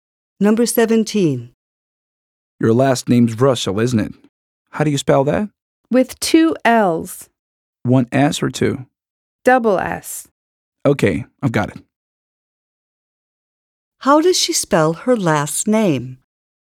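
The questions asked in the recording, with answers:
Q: How does she spell her last name?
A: Russell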